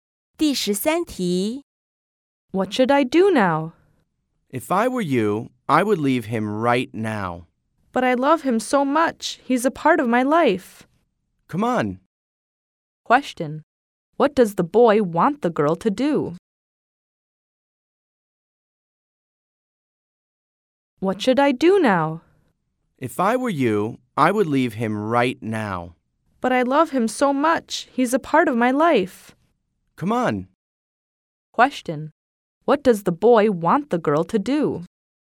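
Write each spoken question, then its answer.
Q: What does the boy want the girl to do?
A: Leave him right now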